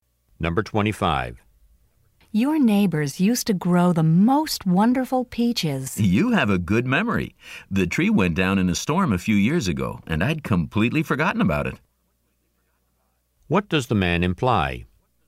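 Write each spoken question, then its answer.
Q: What does the man imply?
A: The peach tree is no longer there.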